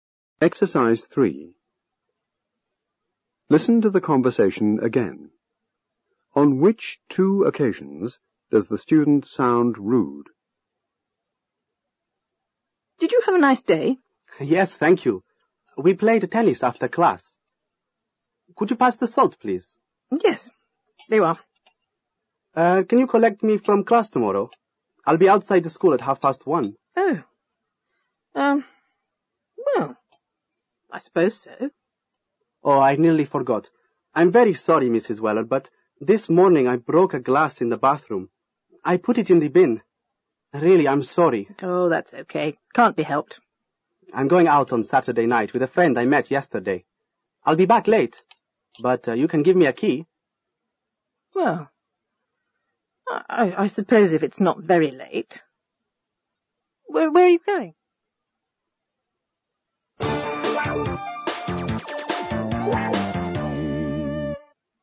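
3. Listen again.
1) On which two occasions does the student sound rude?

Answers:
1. When asking to be collected from class tomorrow, and when saying she'll be back late and can be given a key.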